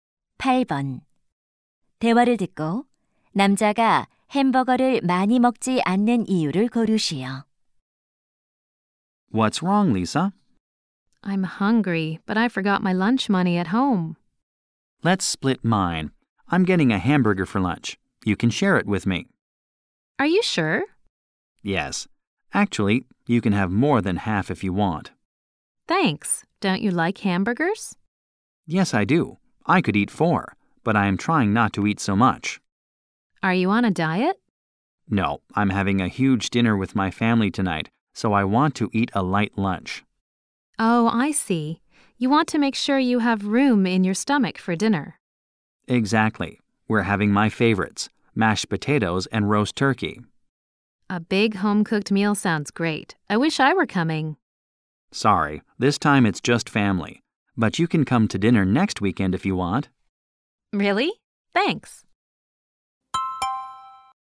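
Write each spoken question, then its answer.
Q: 대화를 듣고 남자가 햄버거를 많이 먹지 않는 이유를 고르시오.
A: 저녁에 가족과 푸짐한 식사를 할 예정이라서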